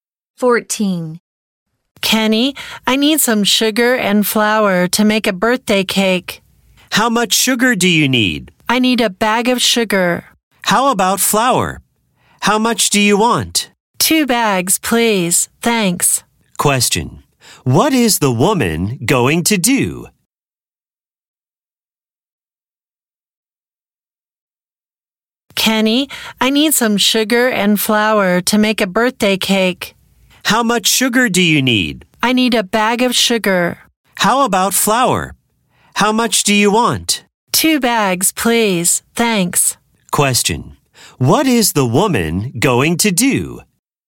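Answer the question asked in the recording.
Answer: Make a birthday cake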